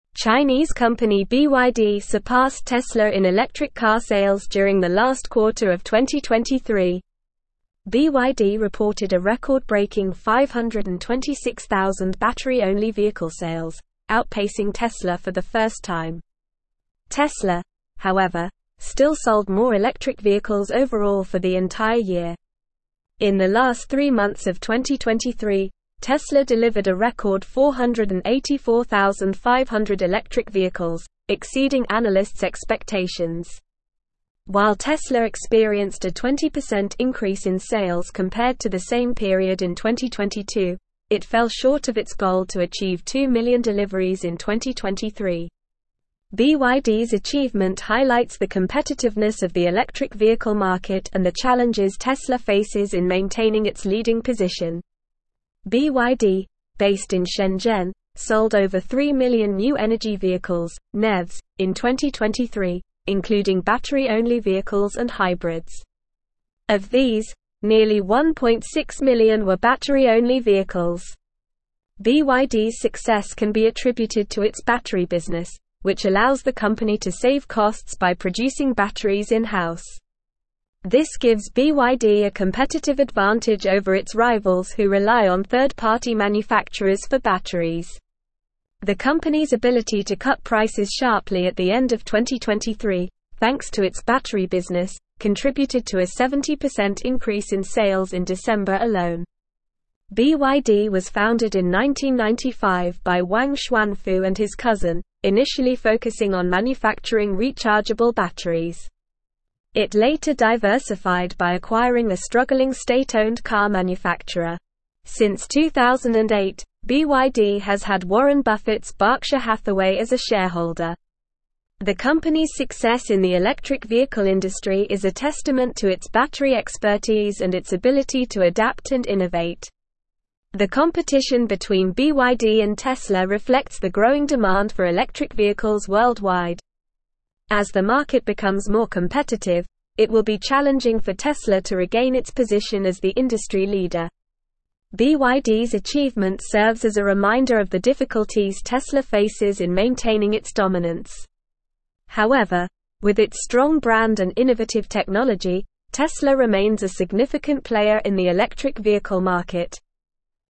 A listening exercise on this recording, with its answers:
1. Chinese company BYD surpassed Tesla in electric car sales during the last (1)______ of 2023.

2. BYD reported a (2)______-breaking 526,000 battery-only (3)______ sales, outpacing Tesla for the first time.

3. BYD reported a (2)______-breaking 526,000 battery-only (3)______ sales, outpacing Tesla for the first time.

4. it fell short of its goal to (4)______ two million deliveries in 2023.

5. BYD's achievement highlights the competitiveness of the (5)______ vehicle market and the challenges (6)______ faces in maintaining its leading (7)______.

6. BYD's achievement highlights the competitiveness of the (5)______ vehicle market and the challenges (6)______ faces in maintaining its leading (7)______.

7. BYD's achievement highlights the competitiveness of the (5)______ vehicle market and the challenges (6)______ faces in maintaining its leading (7)______.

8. BYD, based in Shenzhen, sold over 3 million new energy vehicles (NEVs) in 2023, including (8)______-only vehicles and hybrids.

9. This gives BYD a competitive advantage over its rivals who rely on third-party (9)______s for batteries.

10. contributed to a 70% increase in sales in (10)______ alone.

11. BYD was founded in 1995 by Wang Chuanfu and his (11)______, initially focusing on manufacturing rechargeable batteries.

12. Since 2008, BYD has had Warren Buffett's Berkshire (12)______ as a shareholder.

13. The company's success in the electric vehicle industry is a testament to its battery expertise and its (13)______ to adapt and innovate.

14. As the (14)______ becomes more competitive, it will be challenging for Tesla to (15)______ its position as the industry leader.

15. As the (14)______ becomes more competitive, it will be challenging for Tesla to (15)______ its position as the industry leader.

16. However, with its strong brand and innovative technology, Tesla (16)______ a significant player in the electric vehicle market.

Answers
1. quarter
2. record
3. vehicle
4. achieve
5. electric
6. Tesla
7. position
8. battery
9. manufacturer
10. December
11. cousin
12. Hathaway
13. ability
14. market
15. regain
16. remains

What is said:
Chinese company BYD surpassed Tesla in electric car sales during the last quarter of 2023. BYD reported a record-breaking 526,000 battery-only vehicle sales, outpacing Tesla for the first time. Tesla, however, still sold more electric vehicles overall for the entire year. In the last three months of 2023, Tesla delivered a record 484,500 electric vehicles, exceeding analysts' expectations. While Tesla experienced a 20% increase in sales compared to the same period in 2022, it fell short of its goal to achieve two million deliveries in 2023. BYD's achievement highlights the competitiveness of the electric vehicle market and the challenges Tesla faces in maintaining its leading position.
BYD, based in Shenzhen, sold over 3 million new energy vehicles (NEVs) in 2023, including battery-only vehicles and hybrids. Of these, nearly 1.6 million were battery-only vehicles. BYD's success can be attributed to its battery business, which allows the company to save costs by producing batteries in-house. This gives BYD a competitive advantage over its rivals who rely on third-party manufacturers for batteries. The company's ability to cut prices sharply at the end of 2023, thanks to its battery business, contributed to a 70% increase in sales in December alone.
BYD was founded in 1995 by Wang Chuanfu and his cousin, initially focusing on manufacturing rechargeable batteries. It later diversified by acquiring a struggling state-owned car manufacturer. Since 2008, BYD has had Warren Buffett's Berkshire Hathaway as a shareholder. The company's success in the electric vehicle industry is a testament to its battery expertise and its ability to adapt and innovate.
The competition between BYD and Tesla reflects the growing demand for electric vehicles worldwide. As the market becomes more competitive, it will be challenging for Tesla to regain its position as the industry leader. BYD's achievement serves as a reminder of the difficulties Tesla faces in maintaining its dominance. However, with its strong brand and innovative technology, Tesla remains a significant player in the electric vehicle market.

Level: Level 4